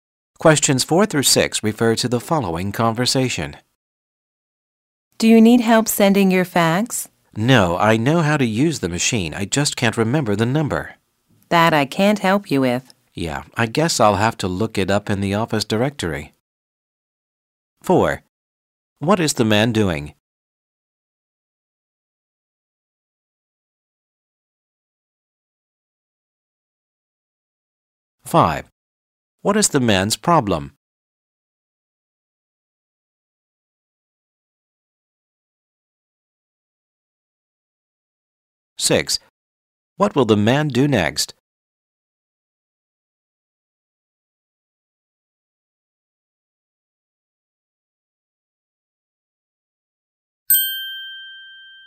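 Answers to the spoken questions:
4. Sending a fax
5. He can't remember the fax number
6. Look up the number in the office directory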